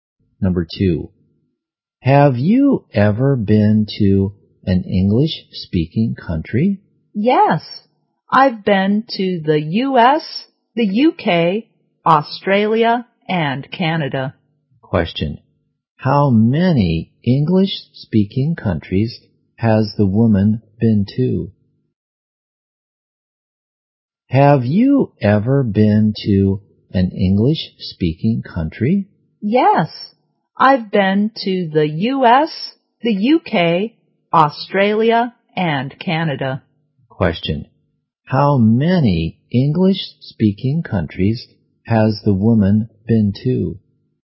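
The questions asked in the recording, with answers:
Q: how many English-speaking countries has the woman been to?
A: Four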